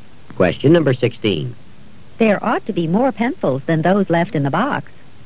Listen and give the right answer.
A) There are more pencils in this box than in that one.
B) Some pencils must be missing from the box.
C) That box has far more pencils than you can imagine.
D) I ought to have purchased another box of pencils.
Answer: B) Some pencils must be missing from the box.

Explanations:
There ought to be more pencils than those left in the box.

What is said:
15. I bought this coat when I was abroad.
16. There ought to be more pencils than those left in the box.